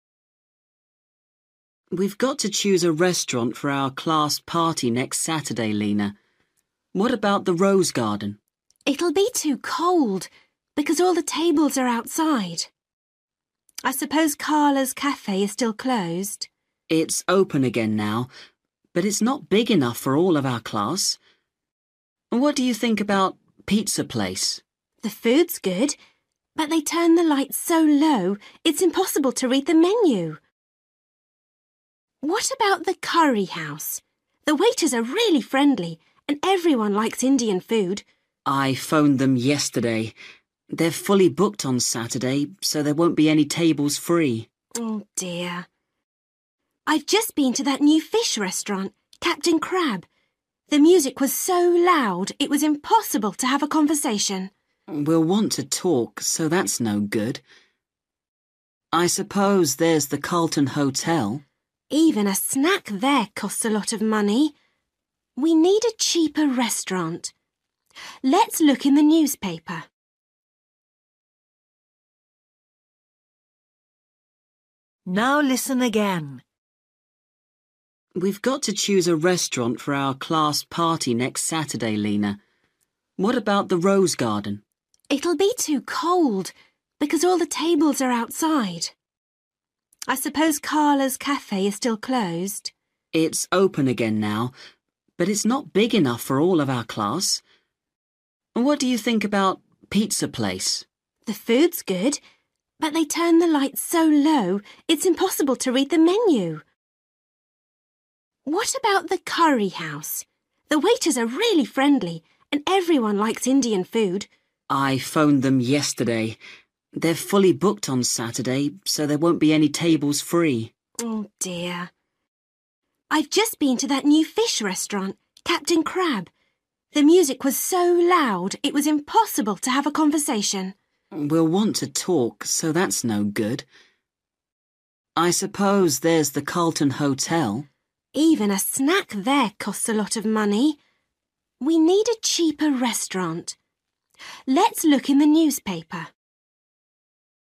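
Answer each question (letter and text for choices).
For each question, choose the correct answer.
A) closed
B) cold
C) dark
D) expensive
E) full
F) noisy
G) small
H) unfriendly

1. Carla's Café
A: G) small

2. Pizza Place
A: C) dark

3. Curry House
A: E) full

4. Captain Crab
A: F) noisy

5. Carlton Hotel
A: D) expensive

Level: Luyện nghe trình độ A2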